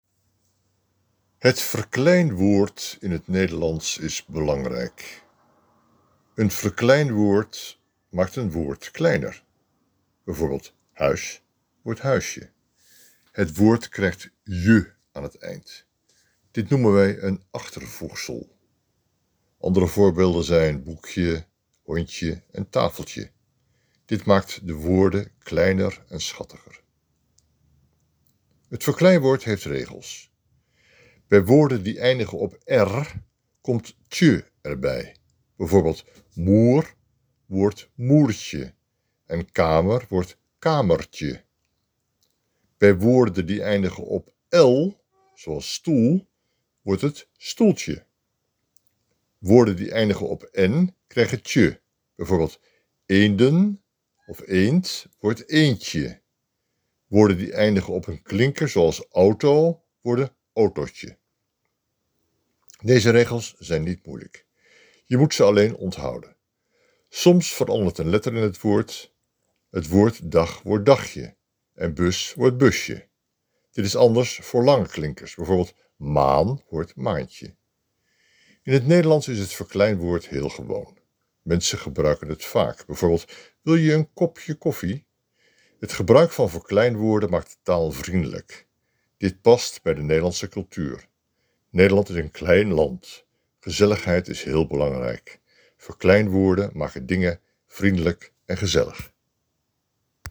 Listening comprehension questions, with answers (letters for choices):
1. Wat is een verkleinwoord?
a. Een groot woord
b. Een kleiner woord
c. Een moeilijk woord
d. Een ander woord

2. Welke woorden krijgen "tje"?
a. Woorden die eindigen met "r"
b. Woorden die eindigen met "m"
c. Woorden die eindigen met "l"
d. Woorden die eindigen met "n"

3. Wat gebeurt er met "auto"?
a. Autotje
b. Autoetje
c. Autootje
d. Autotetje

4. Wat verandert bij "dag"?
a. Dagje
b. Tage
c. Daggetje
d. Dagetje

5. Wat betekent "kamer" als verkleinwoord?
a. Kamert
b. Kamertje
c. Kameren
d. Kamernetje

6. Hoe maken mensen iets kleiner?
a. Door een kleur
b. Door een woord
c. Door een letter toevoegen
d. Door een achtervoegsel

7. Wat gebruiken Nederlanders vaak?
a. Grotere woorden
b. Moeilijke woorden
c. Verkleinwoorden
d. Leenwoorden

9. Wat betekent "stoeltje"?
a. Klein stoel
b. Bank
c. Grote stoel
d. Grote tafel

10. Wat gebeurt met "boek"?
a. Boeketje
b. Boekje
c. Boektje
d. Boekentje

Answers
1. b
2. a
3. c
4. a
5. b
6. d
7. c
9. a
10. b

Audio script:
Het verkleinwoord in het Nederlands is belangrijk. Een verkleinwoord maakt een woord kleiner. Bijvoorbeeld: "huis" wordt "huisje". Het woord krijgt "je" aan het eind. Dit noemen wij een achtervoegsel. Andere voorbeelden zijn "boekje", "hondje" en "tafeltje". Dit maakt de woorden kleiner en schattiger.
Het verkleinwoord heeft regels. Bij woorden die eindigen op "r", komt "tje" erbij. Bijvoorbeeld: "soep" wordt "soepje" en "kamer" wordt "kamertje". Bij woorden die eindigen op "l", zoals "stoel", wordt het "stoeltje". Woorden die eindigen op "en" krijgen "tje". Bijvoorbeeld, "eenden" wordt "eendje". Woorden die eindigen op een klinker, zoals "auto", worden "autootje".
Deze regels zijn niet moeilijk. Je moet ze alleen onthouden. Soms verandert een letter in het woord. Het woord "dag" wordt "dagje" en "bus" wordt "busje". Dit is anders voor lange klinkers. Bijvoorbeeld, "maan" wordt "maantje".
In het Nederlands is het verkleinwoord heel gewoon. Mensen gebruiken het vaak. Bijvoorbeeld: "Wil je een kopje koffie?". Het gebruik van verkleinwoorden maakt de taal vriendelijk. Dit past bij de Nederlandse cultuur. Nederland is een klein land. Gezelligheid is heel belangrijk. Verkleinwoorden maken dingen vriendelijk en gezellig.

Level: A1-A2